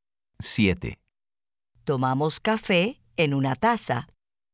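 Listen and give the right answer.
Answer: Sí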